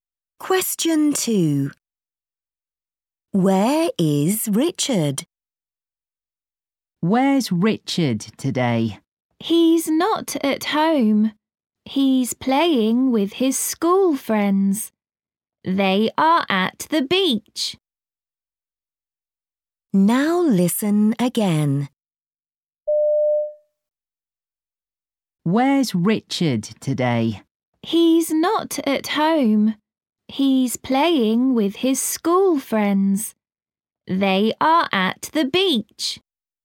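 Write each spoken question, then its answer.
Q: Where is Richard?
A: At the beach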